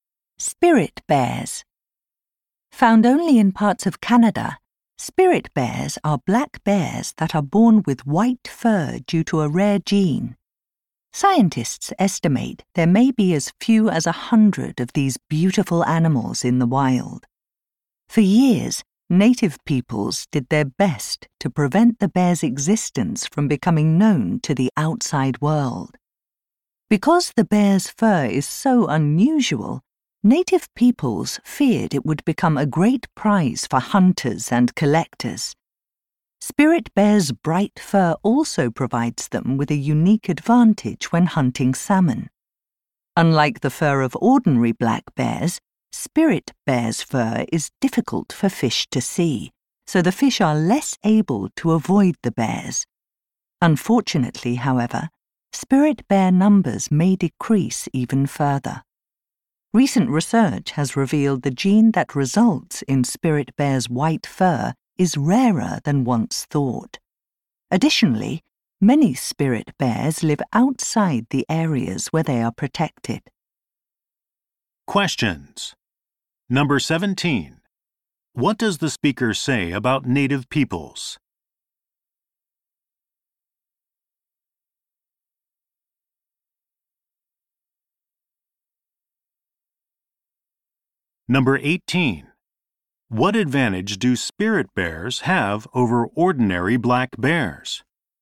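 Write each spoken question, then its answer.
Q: What does the speaker say about native peoples?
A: They tried to keep the spirit bear's existence secret to protect it from hunters and collectors.

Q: What advantage do spirit bears have over ordinary black bears?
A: Their white fur is hard for fish to see, so they catch salmon more easily.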